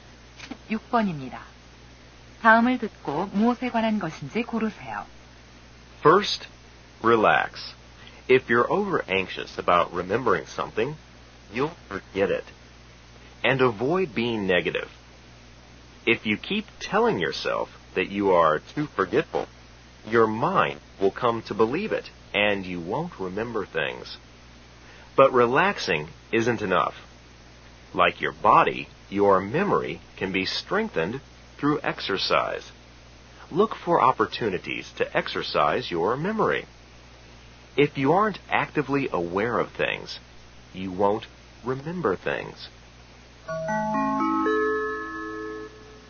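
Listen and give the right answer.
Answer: 기억력을 높이는 방법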